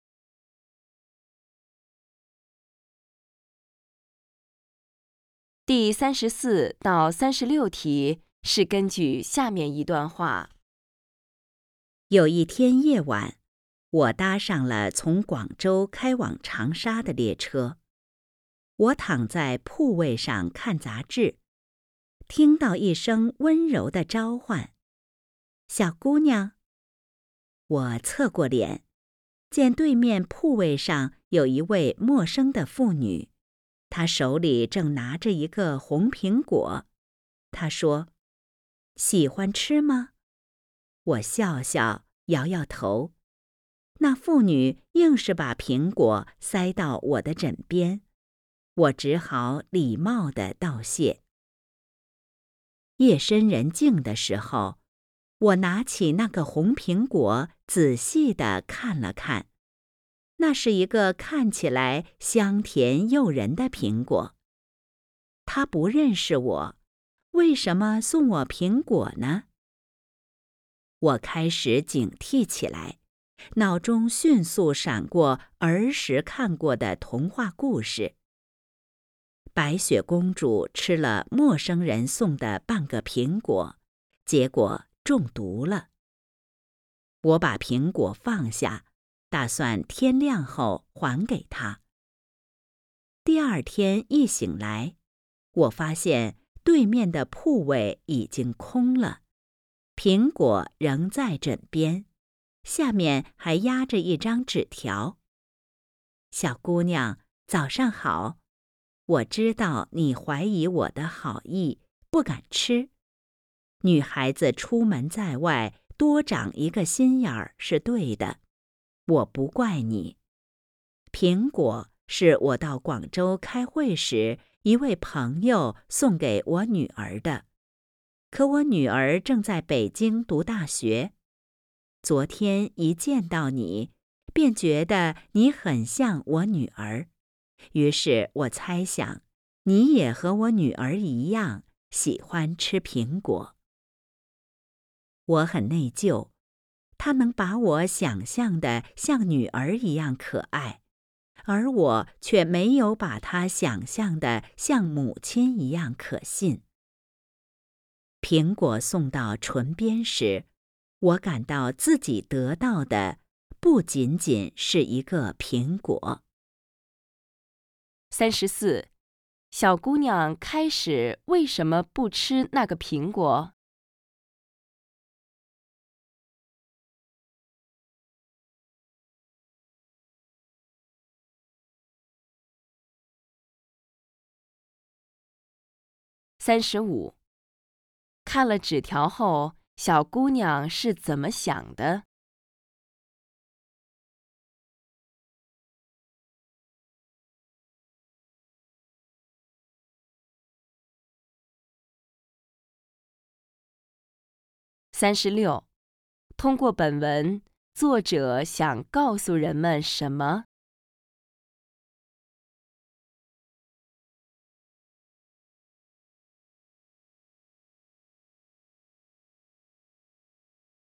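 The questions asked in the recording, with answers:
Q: 小姑娘开始为什么不吃那个苹果?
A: 怀疑陌生人的好意,怕苹果有毒

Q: 看了纸条后,小姑娘是怎么想的?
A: 很内疚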